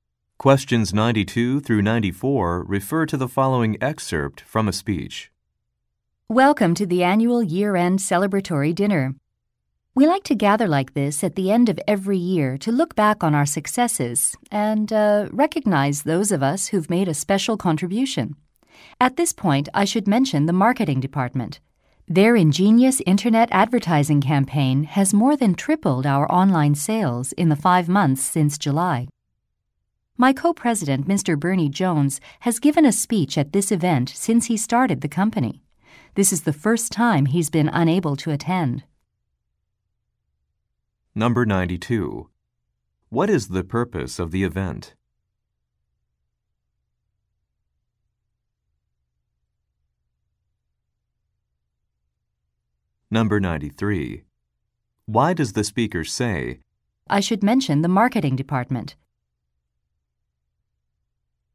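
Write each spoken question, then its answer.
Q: What is the purpose of the event?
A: To celebrate the year's successes and recognize contributions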